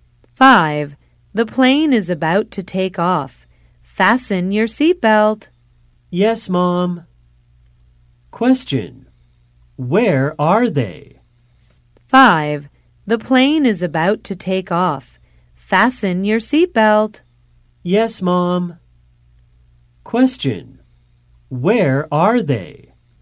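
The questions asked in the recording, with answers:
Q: Where are they?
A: On a plane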